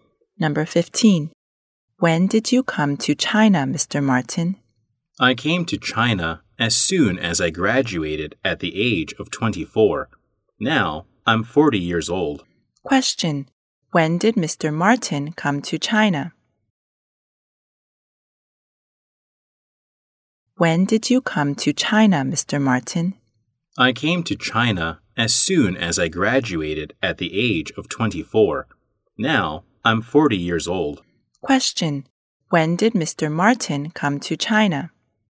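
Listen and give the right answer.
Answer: At the age of 24, as soon as he graduated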